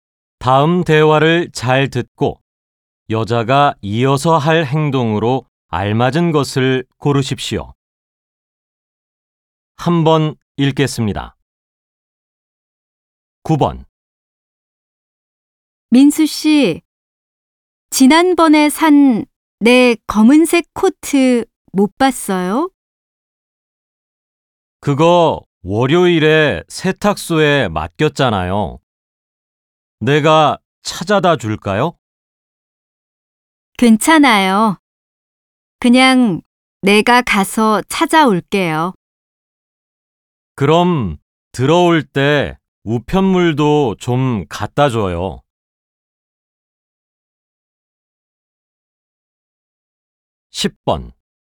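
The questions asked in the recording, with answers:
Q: 다음 대화를 잘 듣고 여자가 이어서 할 행동으로 알맞은 것을 고르십시오.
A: 세탁소에 가서 코트를 찾아온다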